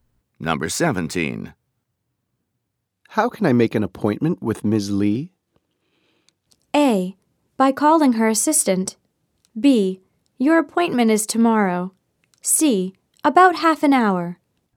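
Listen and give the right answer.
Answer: A: By calling her assistant.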